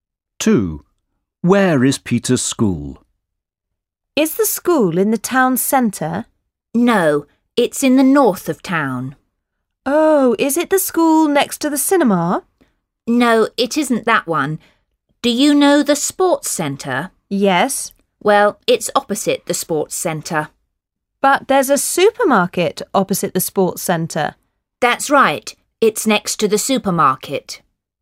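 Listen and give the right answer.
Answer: Next to the supermarket, opposite the sports centre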